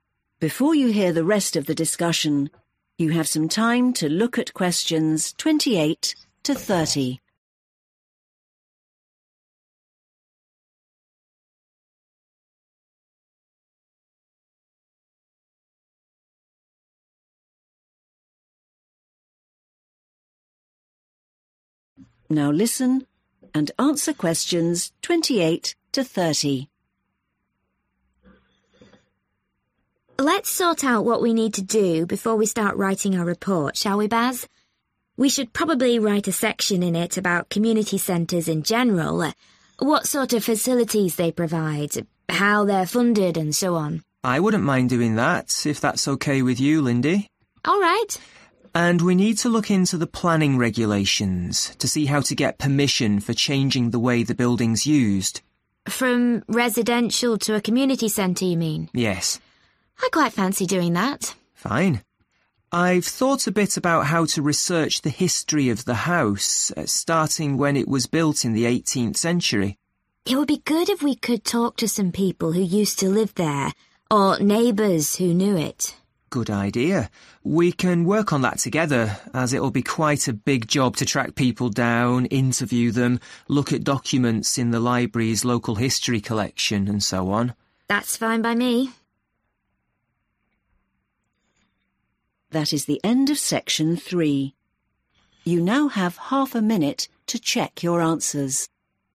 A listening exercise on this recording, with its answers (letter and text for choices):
Who do Lindy and Baz agree should do each job? Choose the correct letter, A, B, or C.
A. Lindy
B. Baz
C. both Lindy and Baz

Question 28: investigate other community centres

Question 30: research the history of the house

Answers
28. B. Baz
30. C. both Lindy and Baz